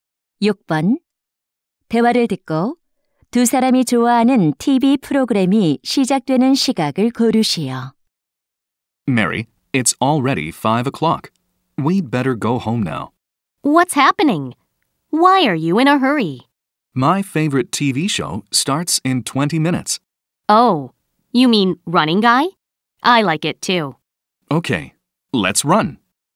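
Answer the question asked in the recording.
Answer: 5시 20분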